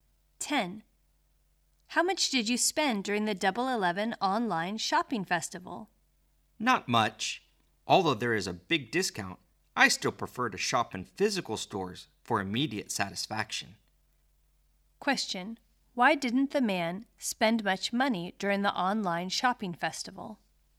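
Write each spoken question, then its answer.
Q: Why didn't the man spend much money during the online shopping festival?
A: He prefers shopping in physical stores for immediate satisfaction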